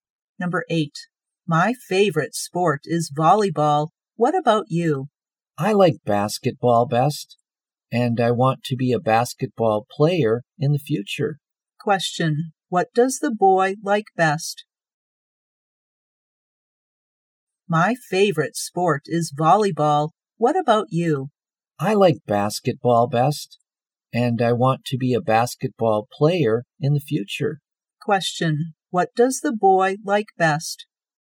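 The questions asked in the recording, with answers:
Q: What does the boy like best?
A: basketball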